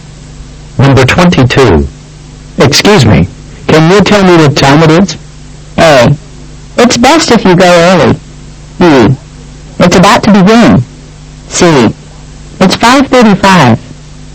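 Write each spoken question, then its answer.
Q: Excuse me, can you tell me what time it is?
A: C: It's 5:35.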